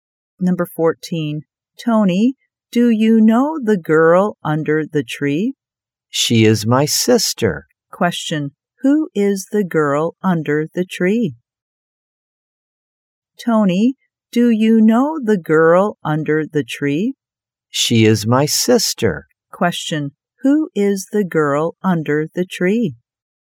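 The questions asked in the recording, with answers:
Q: Who is the girl under the tree?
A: Tony's sister.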